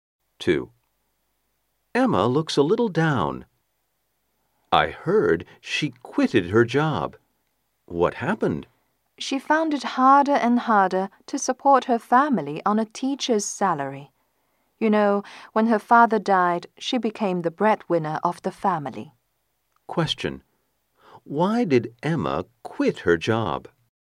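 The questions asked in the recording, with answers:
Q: Why did Emma quit her job?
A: A teacher's salary couldn't support her family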